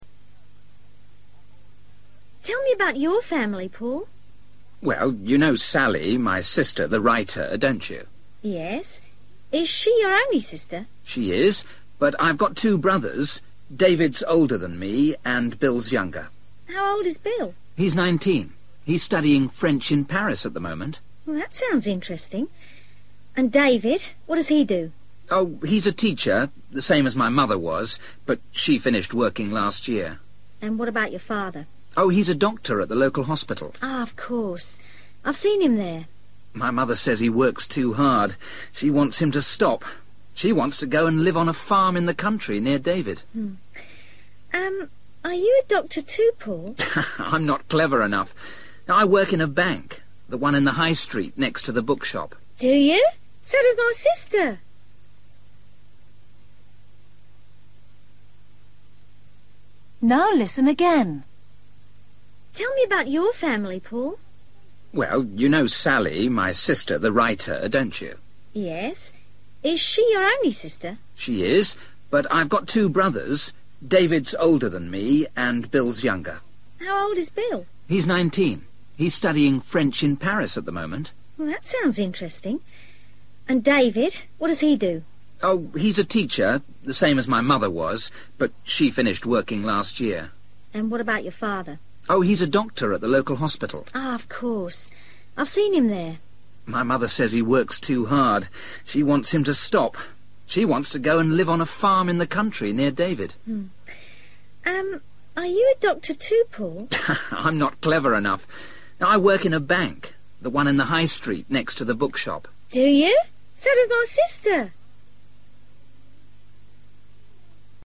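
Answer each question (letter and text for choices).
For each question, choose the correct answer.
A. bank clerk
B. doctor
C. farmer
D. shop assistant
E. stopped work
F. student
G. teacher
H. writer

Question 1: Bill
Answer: F. student

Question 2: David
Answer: G. teacher

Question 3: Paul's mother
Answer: E. stopped work

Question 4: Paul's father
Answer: B. doctor

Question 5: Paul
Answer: A. bank clerk

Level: Luyện nghe trình độ A2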